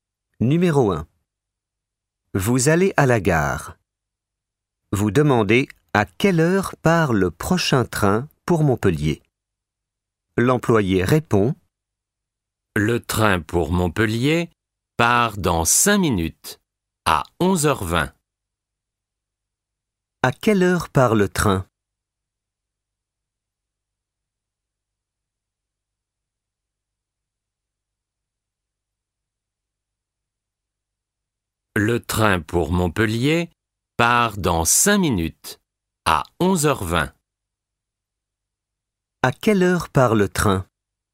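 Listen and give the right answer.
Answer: À 11h20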